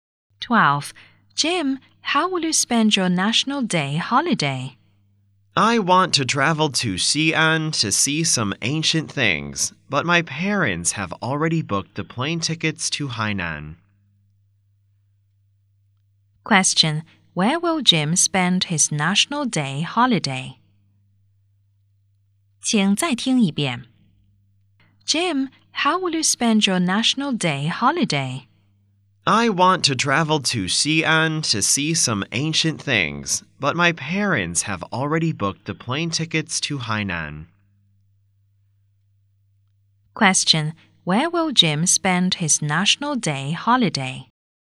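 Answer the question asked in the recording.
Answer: In Hainan.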